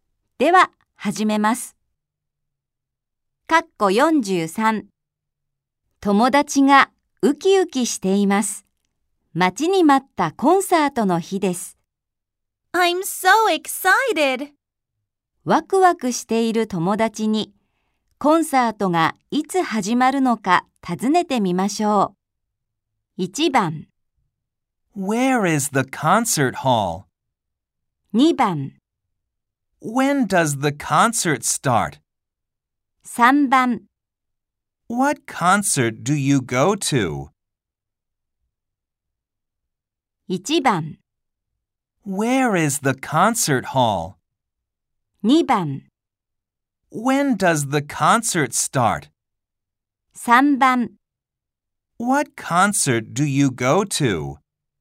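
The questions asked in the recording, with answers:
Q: ワクワクしている友達に、コンサートがいつ始まるのか尋ねてみましょう。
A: 2: When does the concert start?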